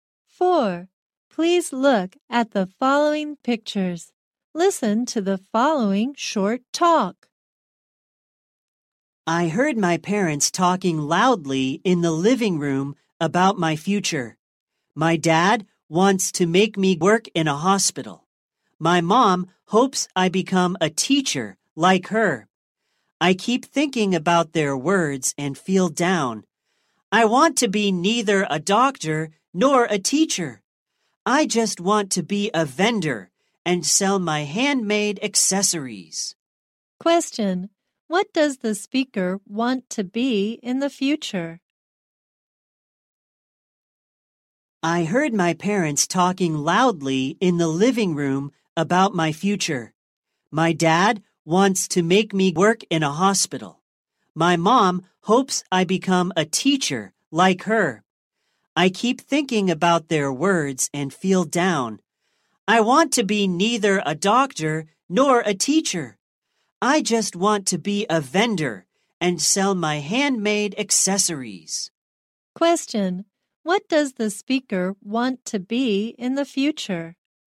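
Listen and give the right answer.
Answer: A vendor selling handmade accessories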